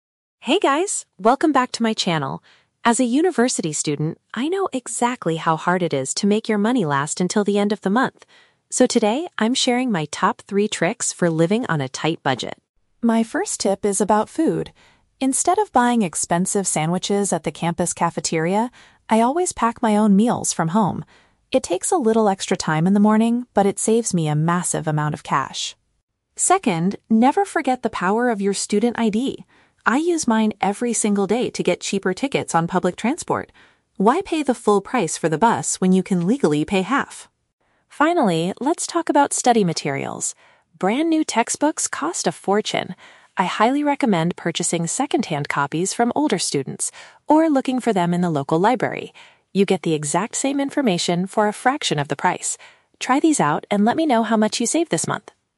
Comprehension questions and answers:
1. What does the vlogger do to avoid spending too much on daily food?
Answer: She prepares her own dishes before going to class.

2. How does the speaker reduce her travel expenses?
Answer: By showing a specific school document to get a discount.

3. What is the final advice given regarding university supplies?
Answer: Acquiring pre-owned textbooks rather than buying them new.

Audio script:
Vlogger: Hey guys, welcome back to my channel! As a university student, I know exactly how hard it is to make your money last until the end of the month. So today, I'm sharing my top three tricks for living on a tight budget.
My first tip is about food. Instead of buying expensive sandwiches at the campus cafeteria, I always pack my own meals from home. It takes a little extra time in the morning, but it saves me a massive amount of cash!
Second, never forget the power of your student ID! I use mine every single day to get cheaper tickets on public transport. Why pay the full price for the bus when you can legally pay half?
Finally, let's talk about study materials. Brand new textbooks cost a fortune. I highly recommend purchasing second-hand copies from older students or looking for them in the local library. You get the exact same information for a fraction of the price. Try these out and let me know how much you save this month!